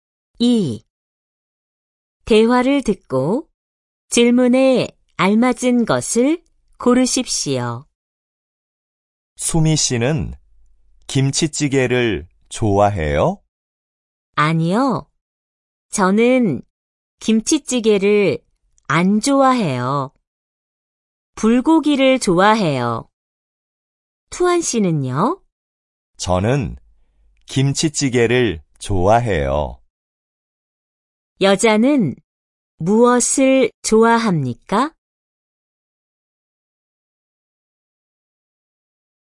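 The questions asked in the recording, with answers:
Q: 여자는 무엇을 좋아합니까?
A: 불고기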